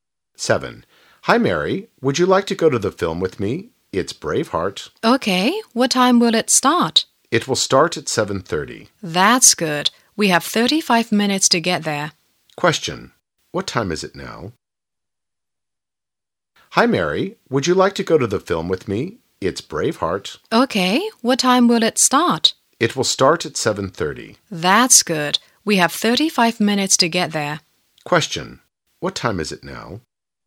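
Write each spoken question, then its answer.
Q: What time is it now?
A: 6:55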